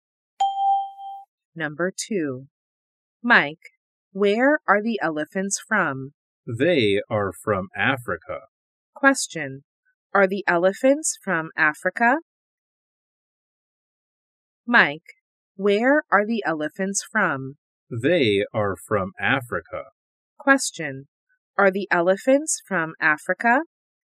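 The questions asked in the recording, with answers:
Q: Are the elephants from Africa?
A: Yes, they are.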